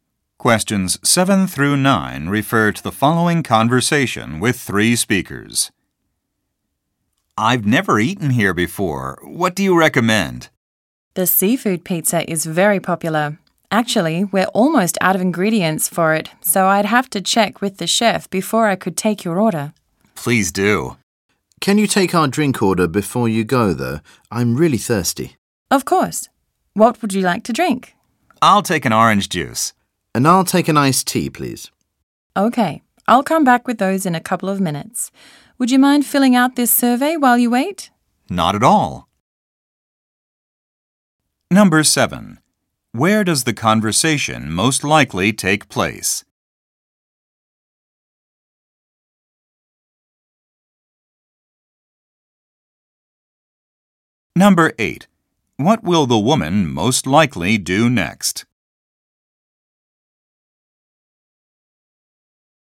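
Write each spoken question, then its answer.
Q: Where does the conversation most likely take place?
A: In a restaurant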